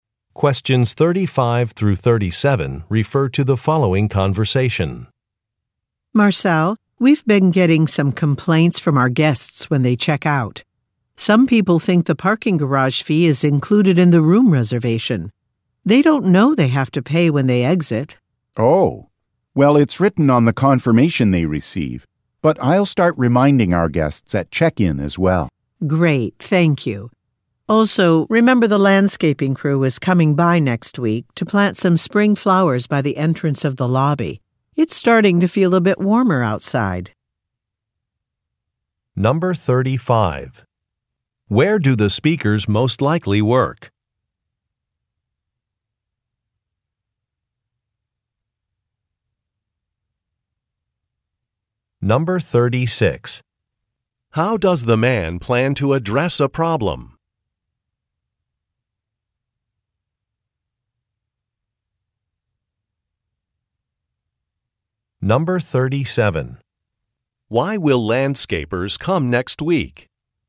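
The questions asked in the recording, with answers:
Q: Where do the speakers most likely work?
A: At a hotel

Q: How does the man plan to address a problem?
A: By reminding guests about the parking fee at check-in

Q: Why will landscapers come next week?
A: To plant spring flowers by the lobby entrance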